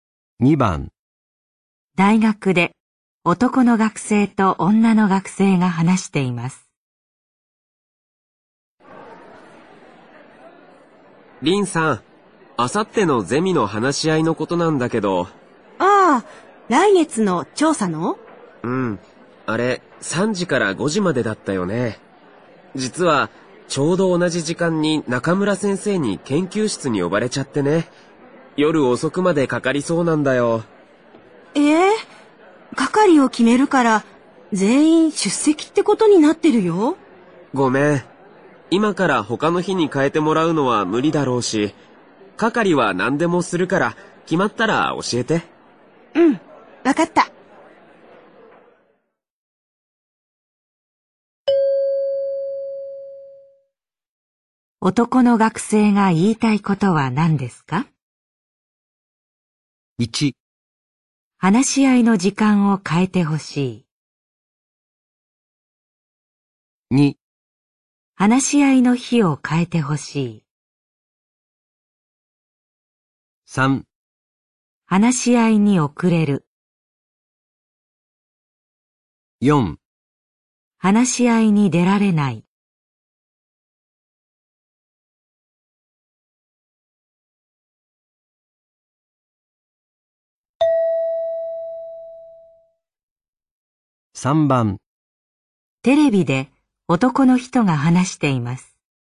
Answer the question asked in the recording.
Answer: 4

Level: N3 Listening · Test 9